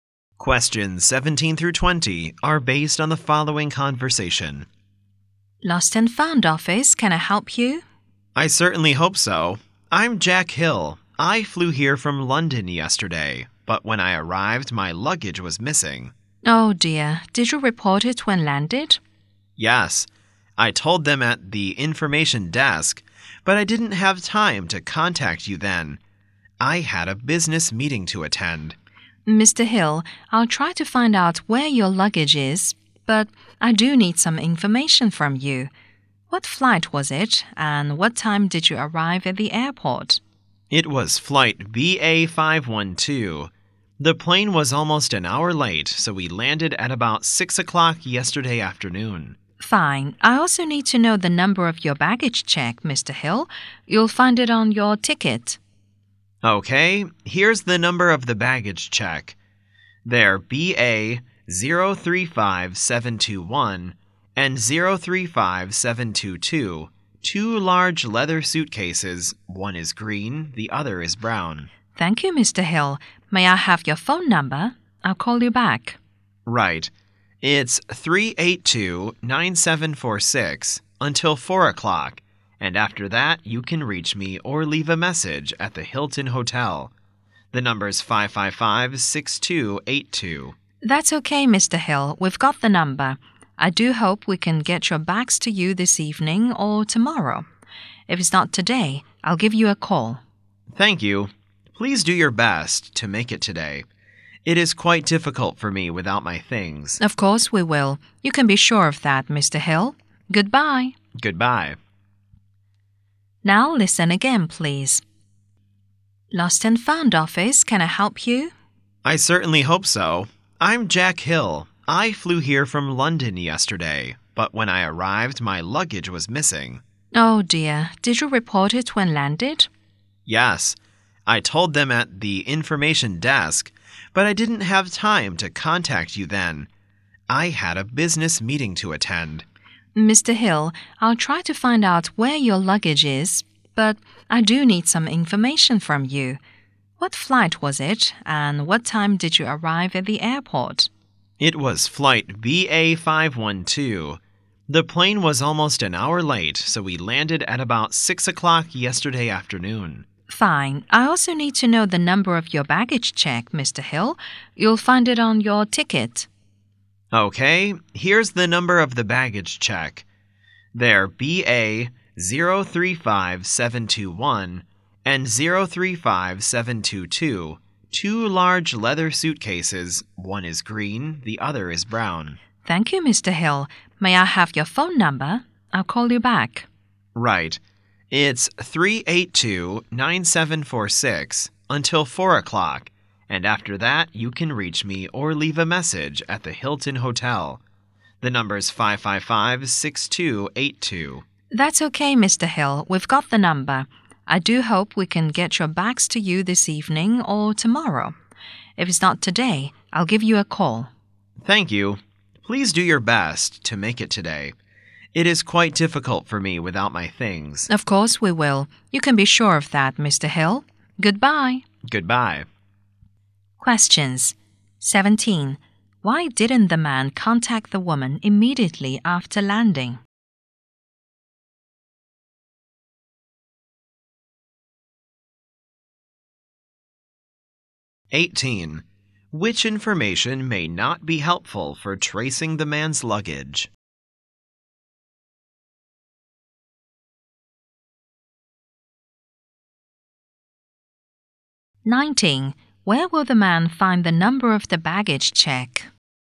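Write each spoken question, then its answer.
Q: Why didn't the man contact the woman immediately after landing?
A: He had a business meeting to attend

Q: Where will the man find the number of the baggage check?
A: On his ticket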